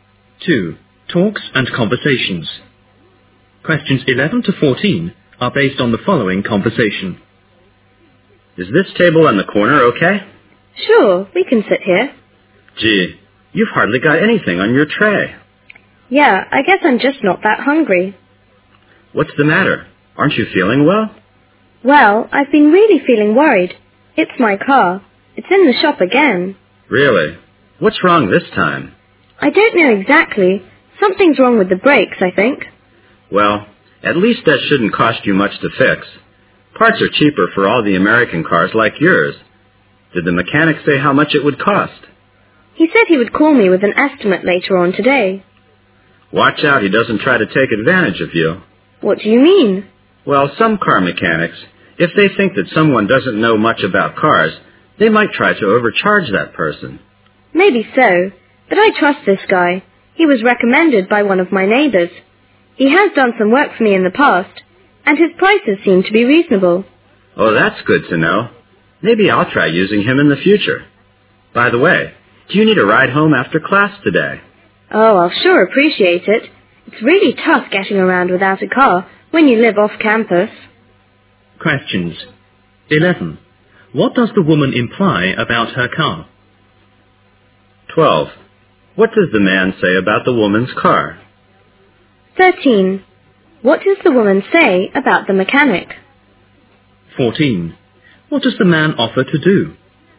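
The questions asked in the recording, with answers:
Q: What does the woman imply about her car?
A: It's in the shop again, probably with a brake problem

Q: What does the man say about the woman's car?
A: It shouldn't cost much to fix because parts for American cars are cheaper

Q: What does the woman say about the mechanic?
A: She trusts him; a neighbor recommended him and his prices are reasonable

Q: What does the man offer to do?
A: Give her a ride home after class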